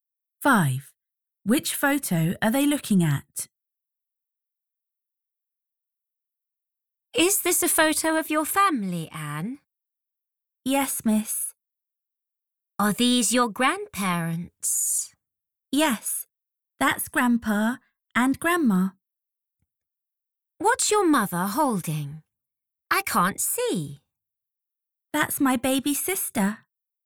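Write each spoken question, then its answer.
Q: Which photo are they looking at?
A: the photo of the family with the grandparents and the mother holding the baby sister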